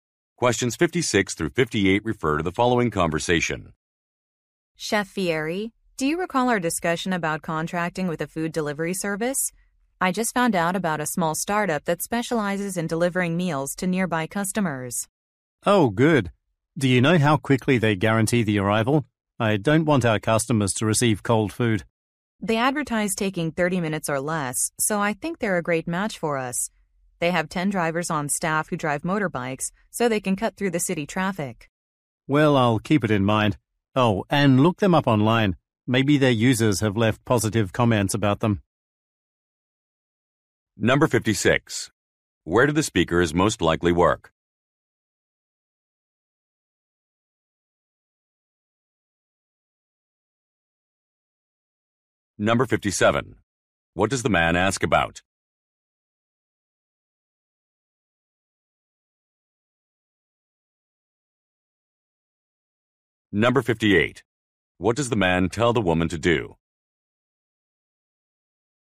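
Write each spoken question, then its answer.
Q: Where do the speakers most likely work?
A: At a restaurant

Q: What does the man ask about?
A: How quickly deliveries arrive

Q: What does the man tell the woman to do?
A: Look the company up online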